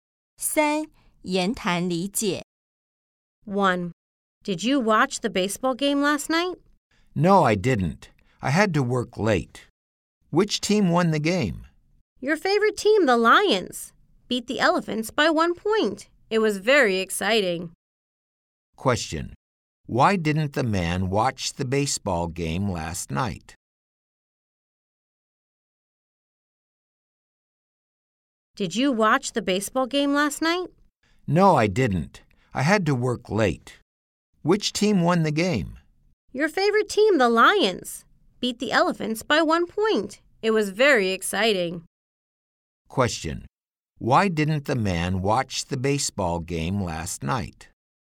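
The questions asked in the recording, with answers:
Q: why didn't the man watch the baseball game last night?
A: He had to work late.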